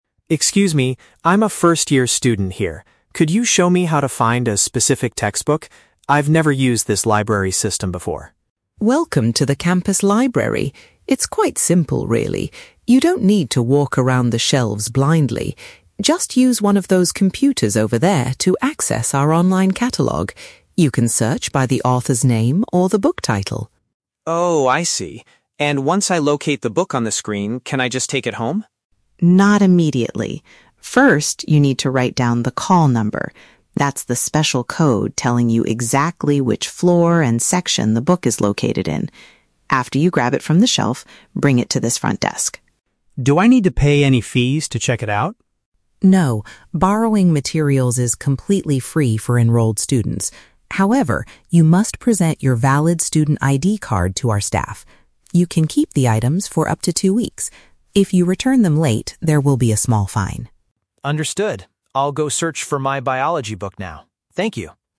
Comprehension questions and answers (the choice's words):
Listen to the conversation between a freshman student and a librarian, and choose the correct answer (A, B, or C) for each question.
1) How should the student look for his required textbook?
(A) By walking through different floors of the library.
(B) By typing information into the library's digital database.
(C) By asking the librarian to find the exact book for him.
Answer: By typing information into the library's digital database.

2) What is the main purpose of the "call number"?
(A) It shows the physical location of the item inside the building.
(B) It is a password used to log into the online computer catalog.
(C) It indicates how many days the student can keep the book.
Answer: It shows the physical location of the item inside the building.

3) What must the student show in order to take the book outside?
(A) A receipt proving he has paid the borrowing fee.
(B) His official university identification document.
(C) A piece of paper with the book author's name.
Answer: His official university identification document.

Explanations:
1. The Key: Ms. Barnes tells Tom to "use one of those computers... to access our online catalog" and "search by the author's name or the book title." Option B paraphrases "online catalog" as "digital database." The Trap: Option (A) is exactly what the librarian tells him not to do ("You don't need to walk around the shelves blindly"). Option (C) is a plausible action in a library, but in this audio, the librarian guides him to do it himself.
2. The Key: The librarian explains that the call number is a code telling him "exactly which floor and section the book is located in." Option A paraphrases "floor and section" as "physical location."

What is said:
Tom: Excuse me, I'm a first-year student here. Could you show me how to find a specific textbook? I've never used this library's system before.
Barnes: Welcome to the campus library! It's quite simple, really. You don't need to walk around the shelves blindly. Just use one of those computers over there to access our online catalog. You can search by the author's name or the book title.
Tom: Oh, I see. And once I locate the book on the screen, can I just take it home?
Barnes: Not immediately. First, you need to write down the call number—that's the special code telling you exactly which floor and section the book is located in. After you grab it from the shelf, bring it to this front desk.
Tom: Do I need to pay any fees to check it out?
Barnes: No, borrowing materials is completely free for enrolled students. However, you must present your valid student ID card to our staff. You can keep the items for up to two weeks. If you return them late, there will be a small fine.